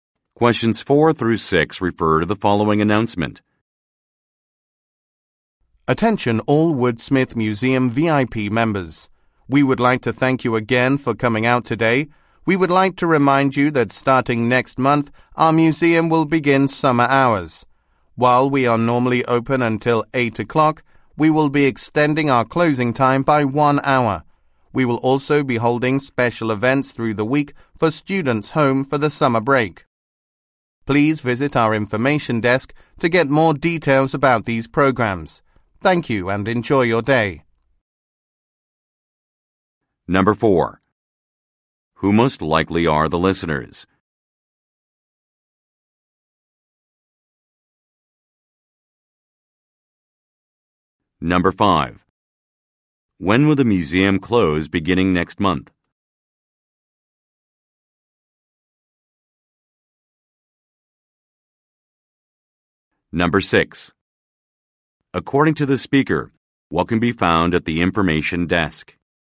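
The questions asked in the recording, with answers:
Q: Who most likely are the listeners?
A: Woodsmith Museum VIP members

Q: When will the museum close beginning next month?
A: At 9 o'clock

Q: According to the speaker, what can be found at the information desk?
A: More details about special summer programs for students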